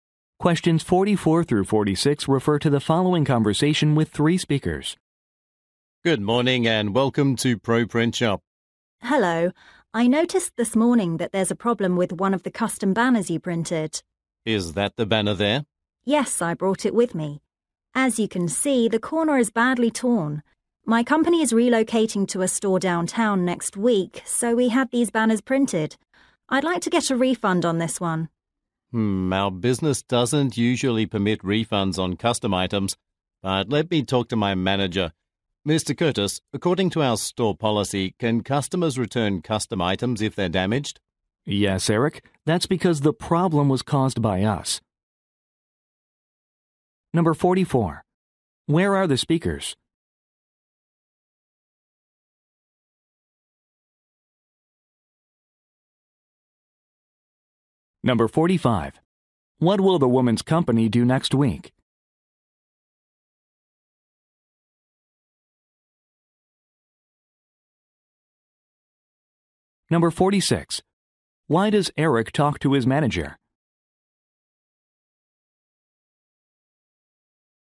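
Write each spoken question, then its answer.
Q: Where are the speakers?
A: At a print shop

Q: What will the woman's company do next week?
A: Relocate to a store downtown

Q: Why does Eric talk to his manager?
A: To check if a refund on a damaged custom item is allowed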